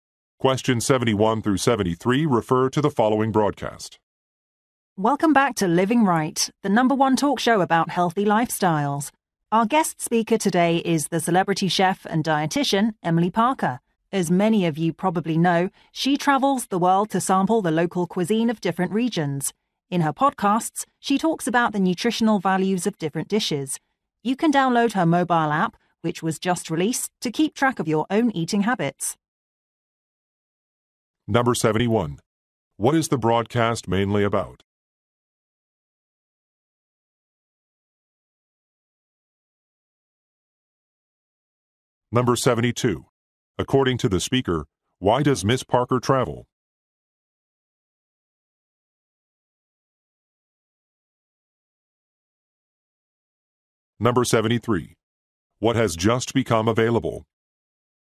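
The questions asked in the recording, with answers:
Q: What is the broadcast mainly about?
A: Healthy lifestyles

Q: According to the speaker, why does Ms. Parker travel?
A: To sample local cuisine of different regions

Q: What has just become available?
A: Her mobile app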